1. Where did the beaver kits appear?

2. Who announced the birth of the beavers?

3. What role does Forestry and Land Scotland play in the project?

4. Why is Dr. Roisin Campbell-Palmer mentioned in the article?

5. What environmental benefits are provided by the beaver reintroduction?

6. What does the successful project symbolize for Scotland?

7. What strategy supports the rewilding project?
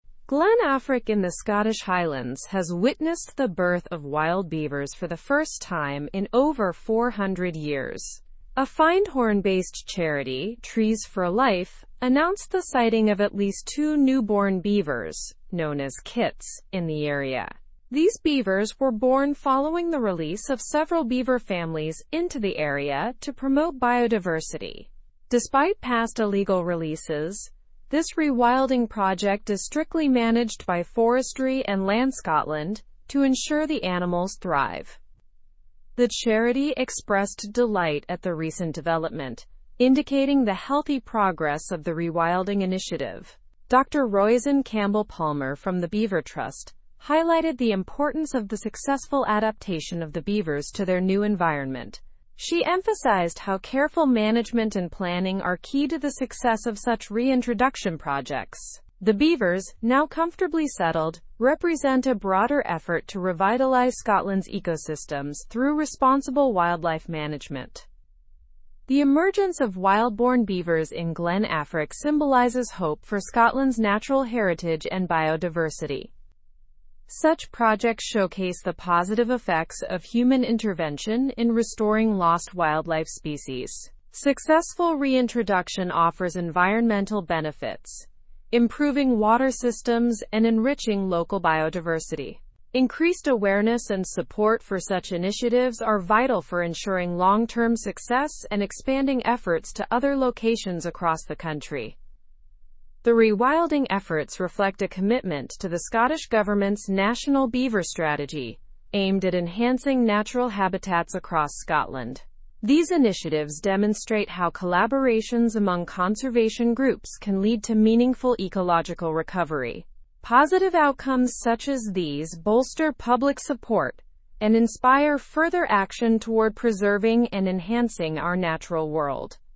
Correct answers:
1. They appeared in Glen Affric, Scottish Highlands.
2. The charity Trees for Life announced it.
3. They manage the rewilding project to ensure the beavers thrive.
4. She highlights the importance of adaptation and successful management.
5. The reintroduction improves water systems and local biodiversity.
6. It symbolizes hope for natural heritage and biodiversity restoration.
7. The project is supported by the National Beaver Strategy.

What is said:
Glen Affric in the Scottish Highlands has witnessed the birth of wild beavers for the first time in over 400 years. A Findhorn-based charity, Trees for Life, announced the sighting of at least two newborn beavers, known as kits, in the area. These beavers were born following the release of several beaver families into the area to promote biodiversity. Despite past illegal releases, this rewilding project is strictly managed by Forestry and Land Scotland to ensure the animals thrive.
The charity expressed delight at the recent development, indicating the healthy progress of the rewilding initiative. Dr. Roisin Campbell-Palmer from the Beaver Trust highlighted the importance of the successful adaptation of the beavers to their new environment. She emphasized how careful management and planning are key to the success of such reintroduction projects. The beavers, now comfortably settled, represent a broader effort to revitalize Scotland's ecosystems through responsible wildlife management.
The emergence of wild-born beavers in Glen Affric symbolizes hope for Scotland's natural heritage and biodiversity. Such projects showcase the positive effects of human intervention in restoring lost wildlife species. Successful reintroduction offers environmental benefits, improving water systems and enriching local biodiversity. Increased awareness and support for such initiatives are vital for ensuring long-term success and expanding efforts to other locations across the country.
The rewilding efforts reflect a commitment to the Scottish government's National Beaver Strategy, aimed at enhancing natural habitats across Scotland. These initiatives demonstrate how collaborations among conservation groups can lead to meaningful ecological recovery. Positive outcomes such as these bolster public support and inspire further action toward preserving and enhancing our natural world.

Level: Level 3